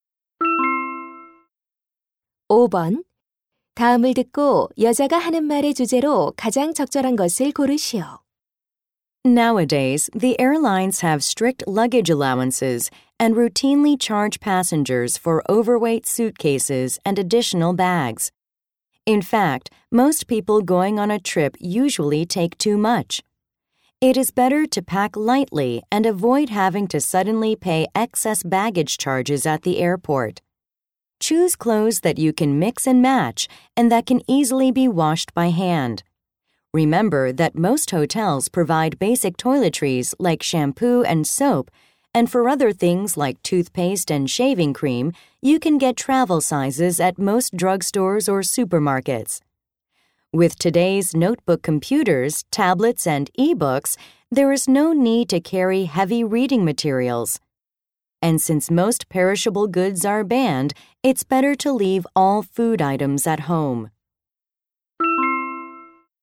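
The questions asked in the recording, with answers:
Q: 다음을 듣고 여자가 하는 말의 주제로 가장 적절한 것을 고르시오.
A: 여행 짐을 가볍게 싸는 방법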